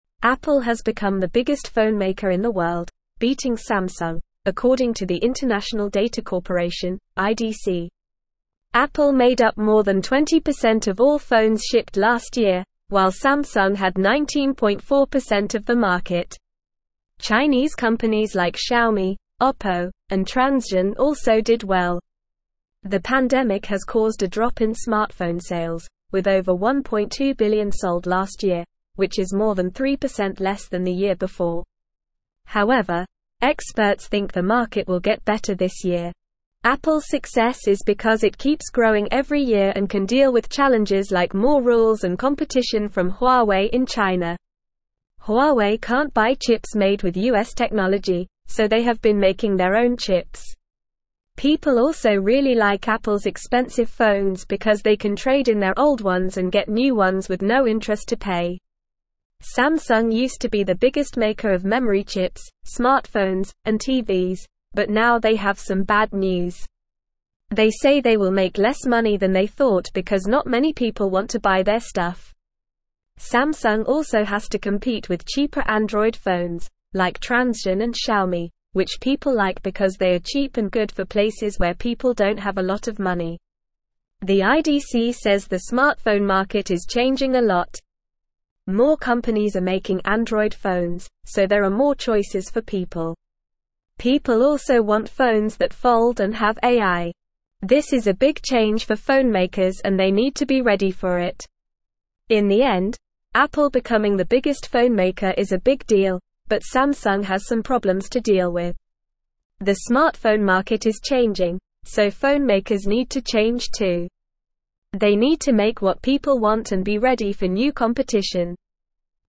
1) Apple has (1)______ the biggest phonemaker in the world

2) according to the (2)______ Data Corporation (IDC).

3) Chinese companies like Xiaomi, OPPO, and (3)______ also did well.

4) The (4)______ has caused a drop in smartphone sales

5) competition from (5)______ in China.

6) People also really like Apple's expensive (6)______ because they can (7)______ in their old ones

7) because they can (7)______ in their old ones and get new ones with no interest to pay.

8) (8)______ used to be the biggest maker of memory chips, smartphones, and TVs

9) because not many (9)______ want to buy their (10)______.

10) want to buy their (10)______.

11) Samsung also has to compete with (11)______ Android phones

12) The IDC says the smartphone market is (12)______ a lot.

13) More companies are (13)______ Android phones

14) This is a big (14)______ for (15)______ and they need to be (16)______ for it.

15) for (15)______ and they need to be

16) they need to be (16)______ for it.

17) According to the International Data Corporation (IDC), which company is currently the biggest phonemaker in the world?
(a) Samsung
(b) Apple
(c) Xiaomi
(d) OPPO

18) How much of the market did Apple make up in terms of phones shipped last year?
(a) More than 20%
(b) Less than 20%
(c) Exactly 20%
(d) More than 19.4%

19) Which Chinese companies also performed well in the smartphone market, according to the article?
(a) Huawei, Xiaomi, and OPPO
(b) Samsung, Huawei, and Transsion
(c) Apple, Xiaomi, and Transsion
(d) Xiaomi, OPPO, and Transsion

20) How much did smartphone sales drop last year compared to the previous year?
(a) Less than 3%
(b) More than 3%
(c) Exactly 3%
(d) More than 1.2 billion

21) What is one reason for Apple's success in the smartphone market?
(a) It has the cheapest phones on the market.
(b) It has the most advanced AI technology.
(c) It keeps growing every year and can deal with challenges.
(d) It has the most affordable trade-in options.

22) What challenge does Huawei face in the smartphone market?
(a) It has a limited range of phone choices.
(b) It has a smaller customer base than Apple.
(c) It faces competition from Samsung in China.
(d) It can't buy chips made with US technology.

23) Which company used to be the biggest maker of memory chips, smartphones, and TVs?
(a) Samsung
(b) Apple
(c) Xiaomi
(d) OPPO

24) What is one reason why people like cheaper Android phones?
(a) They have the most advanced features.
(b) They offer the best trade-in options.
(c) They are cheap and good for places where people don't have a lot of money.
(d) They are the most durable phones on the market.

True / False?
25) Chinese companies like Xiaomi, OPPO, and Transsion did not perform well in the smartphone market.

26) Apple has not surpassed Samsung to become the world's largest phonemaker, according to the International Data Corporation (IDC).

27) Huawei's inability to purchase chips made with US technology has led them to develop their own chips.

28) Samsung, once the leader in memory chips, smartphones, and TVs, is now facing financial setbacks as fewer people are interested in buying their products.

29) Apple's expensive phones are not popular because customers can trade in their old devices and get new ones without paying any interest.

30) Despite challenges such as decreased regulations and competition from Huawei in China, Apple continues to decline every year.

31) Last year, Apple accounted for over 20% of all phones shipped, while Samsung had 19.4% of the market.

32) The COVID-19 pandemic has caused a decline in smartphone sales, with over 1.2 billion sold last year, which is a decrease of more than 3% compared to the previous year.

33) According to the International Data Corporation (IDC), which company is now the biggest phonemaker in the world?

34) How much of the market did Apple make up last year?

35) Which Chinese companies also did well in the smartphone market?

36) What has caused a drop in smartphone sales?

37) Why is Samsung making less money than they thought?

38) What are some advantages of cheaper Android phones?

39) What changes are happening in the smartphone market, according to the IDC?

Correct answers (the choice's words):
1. become
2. International
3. Transsion
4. pandemic
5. Huawei
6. phones
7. trade
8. Samsung
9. people
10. stuff
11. cheaper
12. changing
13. making
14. change
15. phonemakers
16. ready
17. Apple
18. More than 20%
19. Xiaomi, OPPO, and Transsion
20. More than 3%
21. It keeps growing every year and can deal with challenges.
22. It can't buy chips made with US technology.
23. Samsung
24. They are cheap and good for places where people don't have a lot of money.
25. False
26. False
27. True
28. True
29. False
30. False
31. True
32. True
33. According to the International Data Corporation (IDC), Apple is now the biggest phonemaker in the world.
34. Apple made up more than 20% of the market last year.
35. Chinese companies like Xiaomi, OPPO, and Transsion also did well in the smartphone market.
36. The drop in smartphone sales has been caused by the pandemic.
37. Samsung is making less money than they thought because not many people want to buy their products.
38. Cheaper Android phones, like Transsion and Xiaomi, are liked because they are affordable and suitable for people with limited funds.
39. According to the IDC, the smartphone market is changing with more companies making Android phones, and people are looking for phones that fold and have AI.

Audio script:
Apple has become the biggest phonemaker in the world, beating Samsung, according to the International Data Corporation (IDC). Apple made up more than 20% of all phones shipped last year, while Samsung had 19.4% of the market. Chinese companies like Xiaomi, OPPO, and Transsion also did well. The pandemic has caused a drop in smartphone sales, with over 1.2 billion sold last year, which is more than 3% less than the year before. However, experts think the market will get better this year.
Apple's success is because it keeps growing every year and can deal with challenges like more rules and competition from Huawei in China. Huawei can't buy chips made with US technology, so they have been making their own chips. People also really like Apple's expensive phones because they can trade in their old ones and get new ones with no interest to pay.
Samsung used to be the biggest maker of memory chips, smartphones, and TVs, but now they have some bad news. They say they will make less money than they thought because not many people want to buy their stuff. Samsung also has to compete with cheaper Android phones, like Transsion and Xiaomi, which people like because they are cheap and good for places where people don't have a lot of money.
The IDC says the smartphone market is changing a lot. More companies are making Android phones, so there are more choices for people. People also want phones that fold and have AI. This is a big change for phonemakers and they need to be ready for it.
In the end, Apple becoming the biggest phonemaker is a big deal, but Samsung has some problems to deal with. They need to make what people want and be ready for new competition.

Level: Level 3